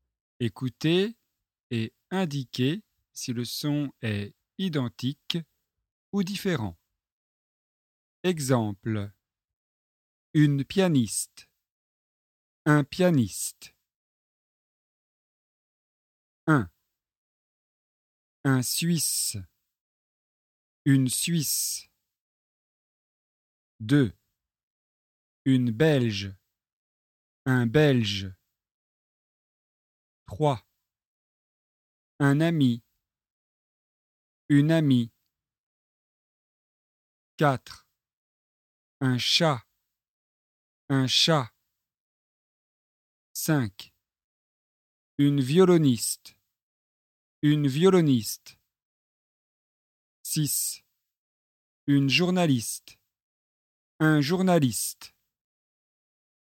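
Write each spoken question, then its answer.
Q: Un Suisse. Une Suisse.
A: identique

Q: Une Belge. Un Belge.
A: identique

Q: Un ami. Une amie.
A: identique

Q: Une journaliste. Un journaliste.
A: identique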